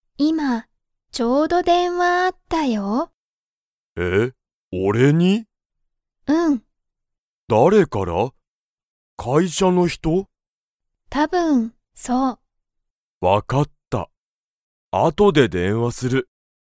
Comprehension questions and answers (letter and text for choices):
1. ____電話でんわがあった。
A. 今いまちょうど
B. たぶん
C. こんなに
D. 昔むかしの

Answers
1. A. 今いまちょうど

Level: Level 1